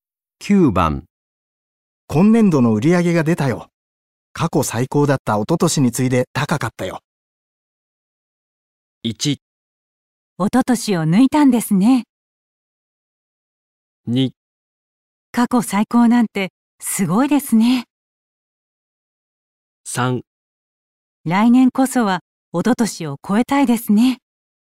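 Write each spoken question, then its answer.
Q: 今年度の売り上げが出たよ。過去最高だった一昨年に次いで高かったよ。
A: 3: 来年こそは一昨年を超えたいですね。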